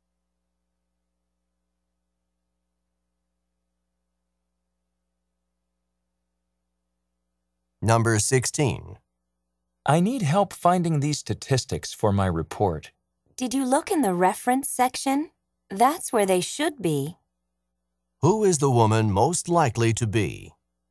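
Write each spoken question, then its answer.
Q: Who is the woman most likely to be?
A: A librarian.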